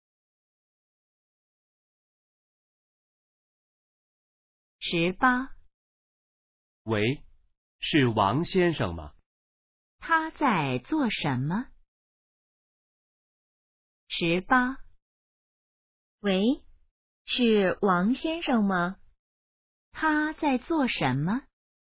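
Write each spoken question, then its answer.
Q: 他在做什么?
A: 打电话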